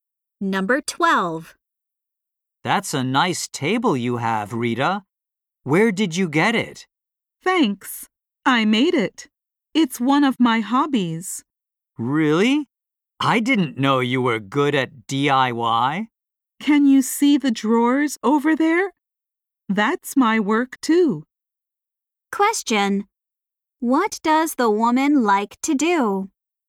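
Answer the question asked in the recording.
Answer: Make furniture (DIY)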